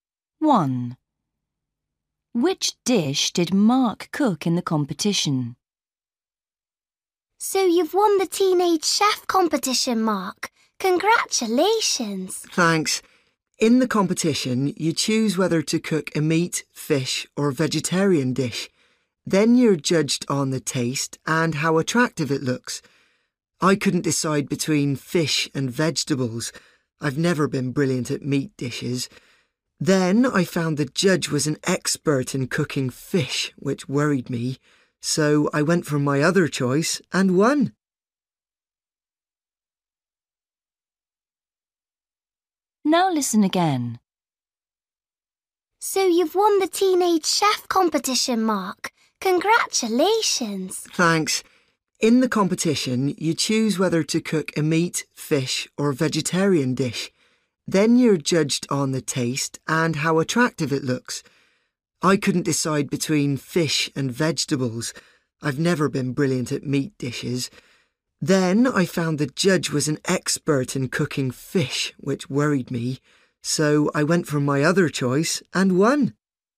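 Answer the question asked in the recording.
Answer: a vegetarian dish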